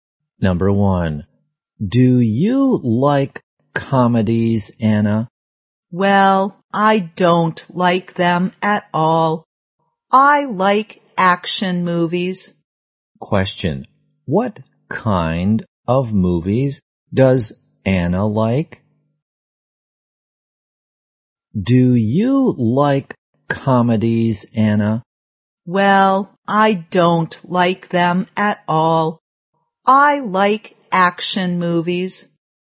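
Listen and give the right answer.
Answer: Action movies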